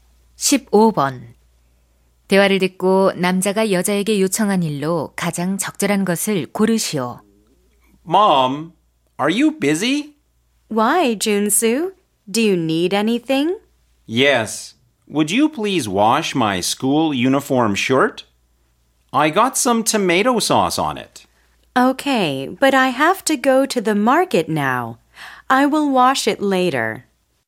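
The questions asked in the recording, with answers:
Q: 대화를 듣고 남자가 여자에게 요청한 일로 가장 적절한 것을 고르시오.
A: 교복 셔츠 세탁하기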